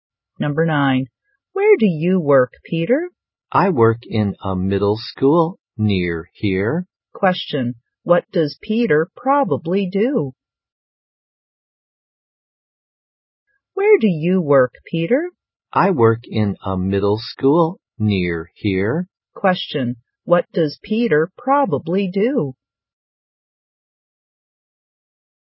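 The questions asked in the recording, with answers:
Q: What does Peter probably do?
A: He is a teacher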